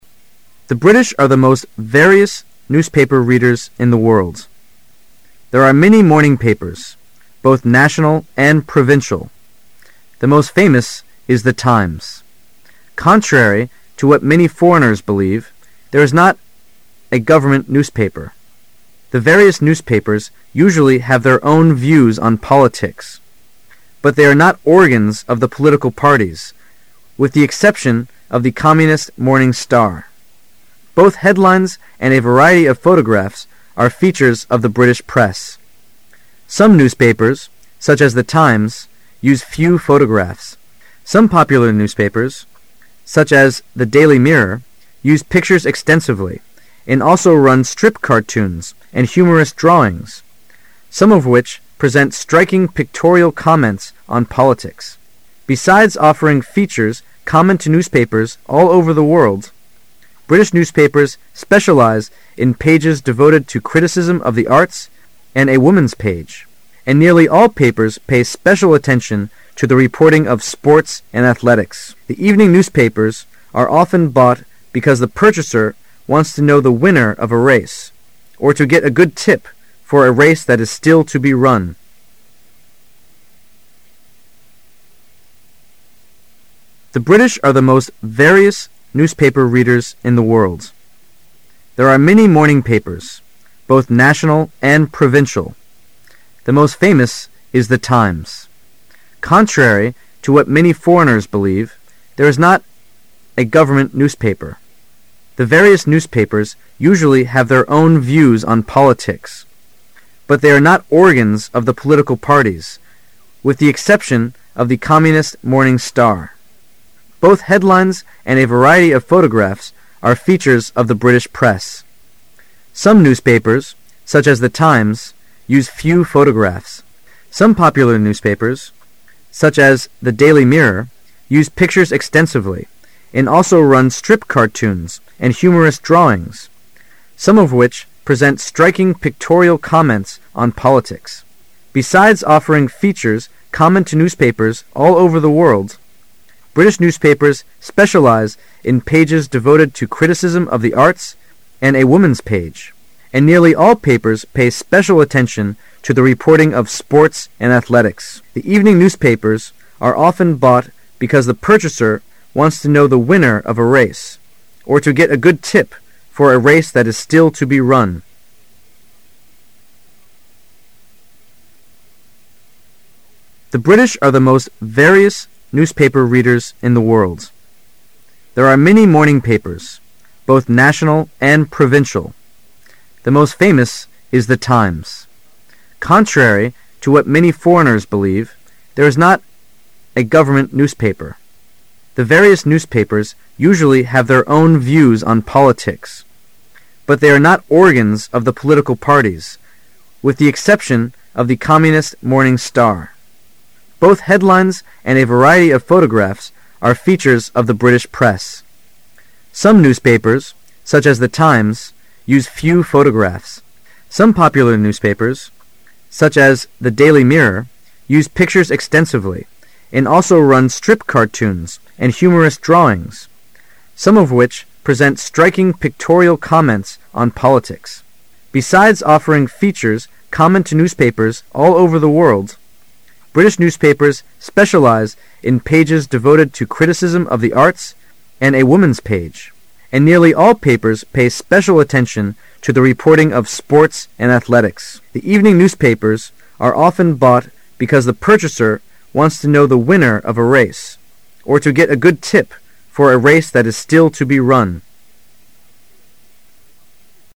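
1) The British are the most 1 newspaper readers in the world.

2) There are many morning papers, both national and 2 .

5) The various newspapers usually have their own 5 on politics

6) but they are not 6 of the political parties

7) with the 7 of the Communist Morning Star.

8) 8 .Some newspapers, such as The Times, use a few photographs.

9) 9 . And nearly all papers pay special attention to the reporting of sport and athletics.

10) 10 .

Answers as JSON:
{"1": "various", "2": "provincial", "5": "views", "6": "organs", "7": "exception", "8": "Both headlines and a variety of photographs are features of the British press.", "9": "Besides offering features common to newspapers all over the world, British newspapers specialize in pages devoted to criticism of the arts and a woman's page", "10": "The evening newspapers are often bought because the purchaser wants to know the winner of a race, or to get a good tip for a race that is still to be run."}

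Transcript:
[解析] 15-24 The British are the most (15) various newspaper readers in the world. There are many morning papers, both national and (16) provincial. The most famous is The Times.(17) Contrary to what many foreigners believe, there is not a (18)government newspaper. The various newspapers usually have their own (19) views on politics, but they are not (20) organs of the political parties, with the (21) exception of the Communist Morning Star. (22) Both headlines and a variety of photographs are features of the British press. Some newspapers, such as The Times, use a few photographs. Some popular newspapers, such as The Daily Mirror, use pictures extensively and also run strip - cartoons and humorous drawings. Some of which present striking pictorial comment on politics. (23) Besides offering features common to newspapers all over the world, British newspapers specialize in pages devoted to criticism of the arts and a woman's page. 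And nearly all papers pay special attention to the reporting of sport and athletics.(24) The evening newspapers are often bought because the purchaser wants to know the winner of a race, or to get a good tip for a race that is still to be run.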